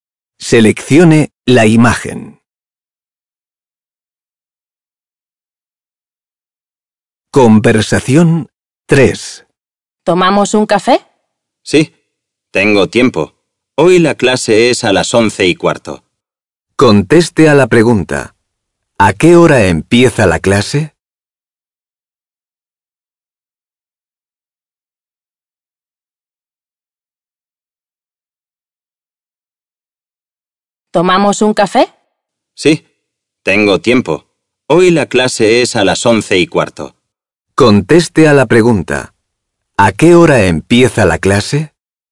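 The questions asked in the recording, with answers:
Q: ¿A qué hora empieza la clase?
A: A las 11:15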